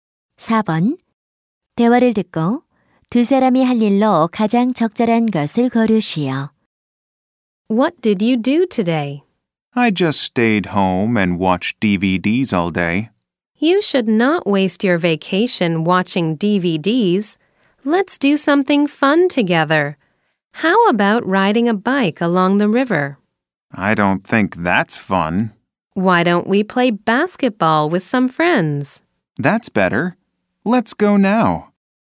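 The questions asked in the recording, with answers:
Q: 대화를 듣고 두 사람이 할 일로 가장 적절한 것을 고르시오.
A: 친구들과 농구하기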